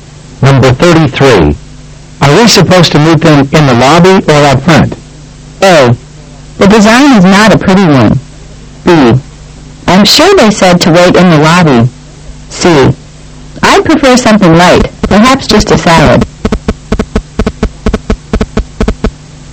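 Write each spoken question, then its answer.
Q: Are we supposed to meet them in the lobby or up front?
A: B: I'm sure they said to wait in the lobby.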